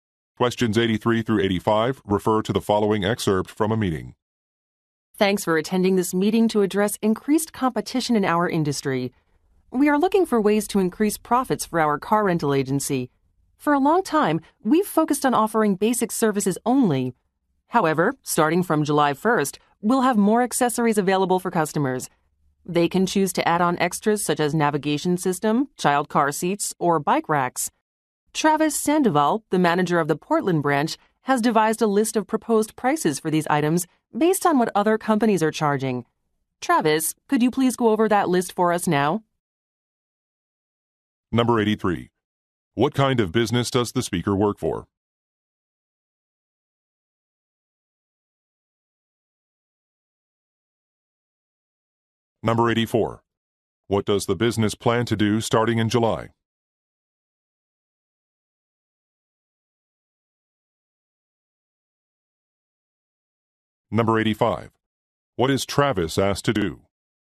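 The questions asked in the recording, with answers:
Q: What kind of business does the speaker work for?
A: A car rental agency

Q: What does the business plan to do starting in July?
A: Offer more accessories to customers

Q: What is Travis asked to do?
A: Go over a list of proposed prices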